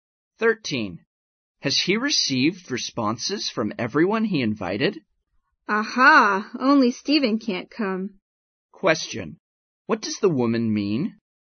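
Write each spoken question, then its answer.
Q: What does the woman mean?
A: Everyone has replied, and only Stephen can't come.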